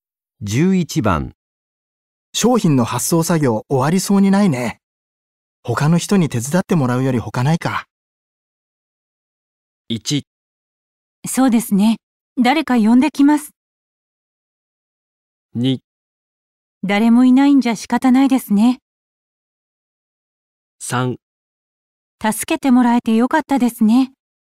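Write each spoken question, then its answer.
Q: 商品の発送作業終わりそうにないね。他の人に手伝ってもらうより他ないか。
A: 1: そうですね。誰か呼んできます。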